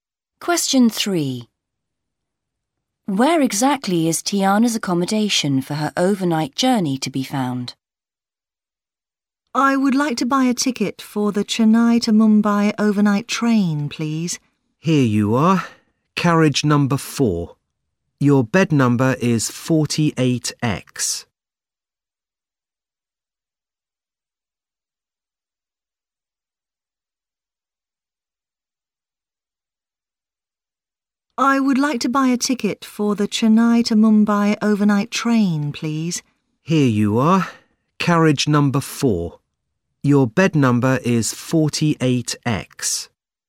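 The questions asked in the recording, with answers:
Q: Where exactly is Tiana's accommodation for her overnight journey to be found?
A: Carriage 4, bed number 48X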